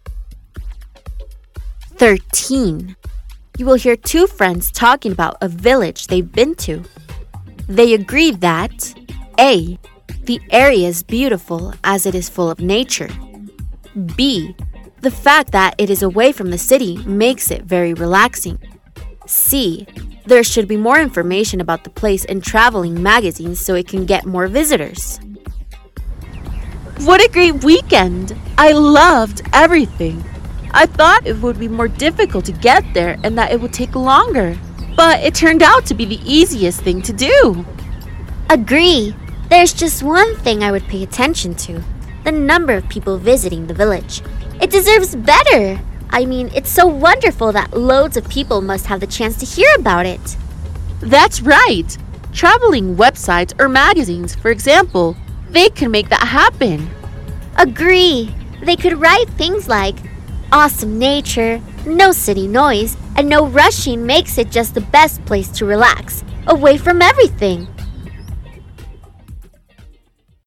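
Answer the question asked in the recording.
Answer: C: There should be more information about the place in traveling magazines so it can get more visitors.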